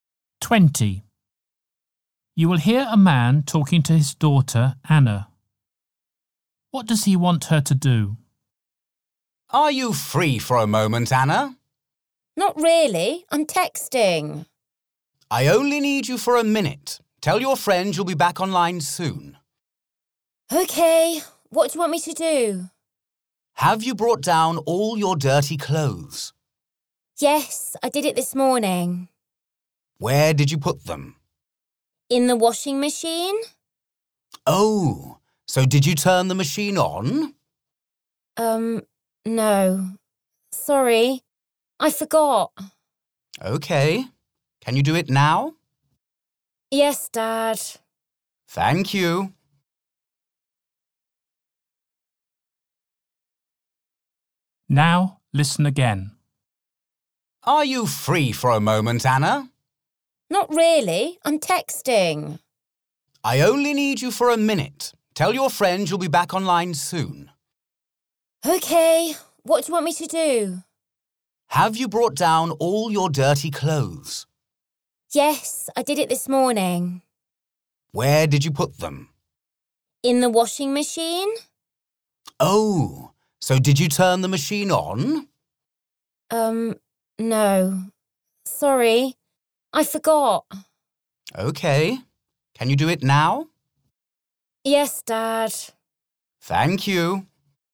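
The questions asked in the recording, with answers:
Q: What does he want her to do?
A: Turn on the washing machine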